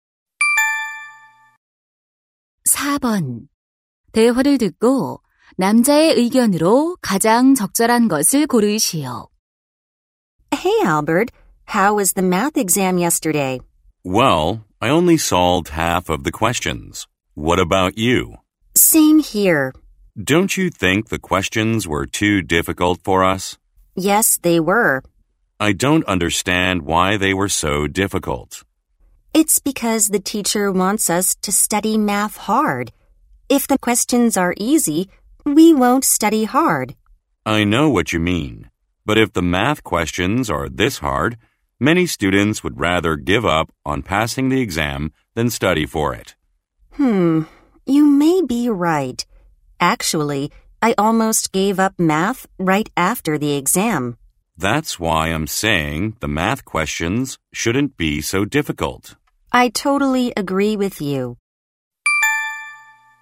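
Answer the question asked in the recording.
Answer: 수학 시험 문제가 너무 어려워서는 안 된다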